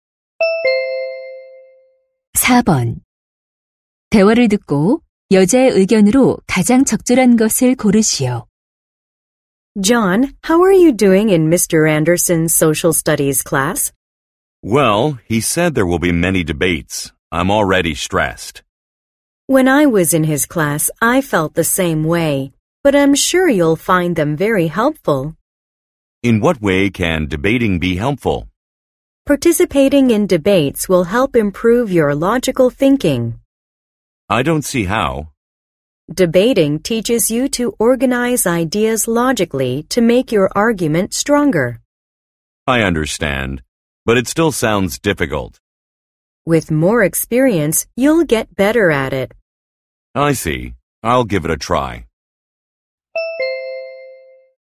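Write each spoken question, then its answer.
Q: 대화를 듣고 여자의 의견으로 가장 적절한 것을 고르시오.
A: 토론은 논리적 사고력 향상에 도움이 된다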